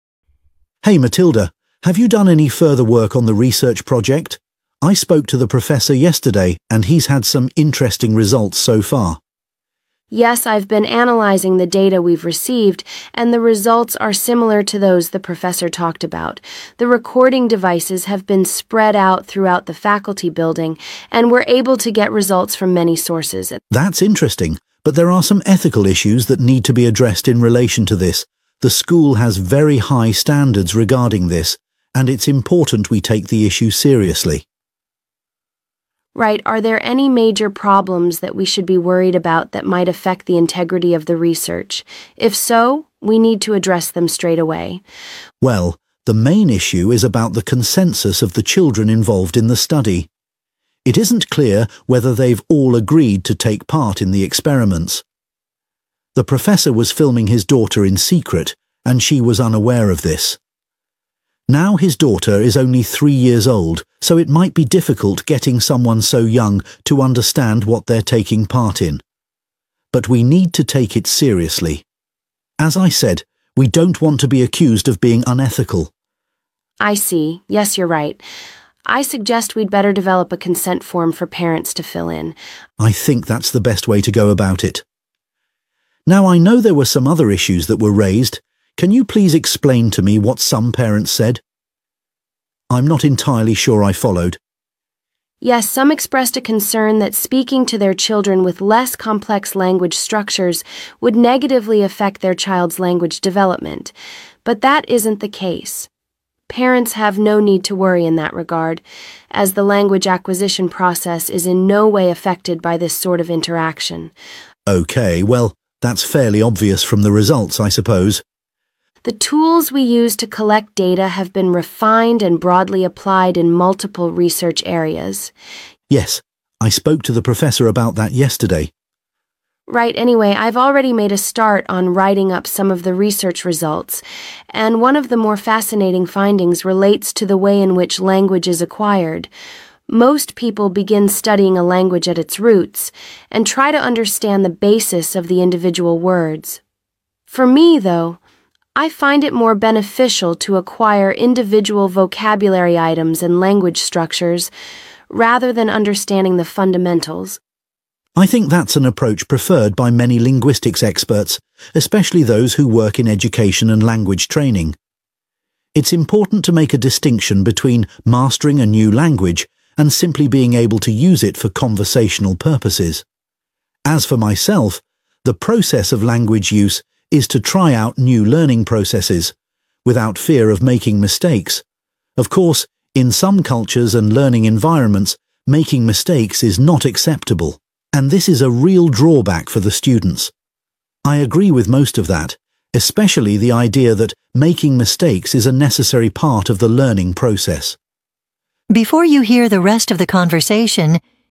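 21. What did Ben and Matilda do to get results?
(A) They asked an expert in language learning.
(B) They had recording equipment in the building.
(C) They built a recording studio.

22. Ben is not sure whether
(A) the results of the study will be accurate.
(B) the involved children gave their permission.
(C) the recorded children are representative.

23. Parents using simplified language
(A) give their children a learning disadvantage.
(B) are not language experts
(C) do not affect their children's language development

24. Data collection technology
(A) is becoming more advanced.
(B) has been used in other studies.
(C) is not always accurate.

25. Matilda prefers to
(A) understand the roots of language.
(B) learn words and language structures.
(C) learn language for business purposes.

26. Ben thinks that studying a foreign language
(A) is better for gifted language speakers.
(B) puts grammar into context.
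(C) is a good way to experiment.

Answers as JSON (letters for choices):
{"21": "B", "22": "B", "23": "C", "24": "B", "25": "B", "26": "C"}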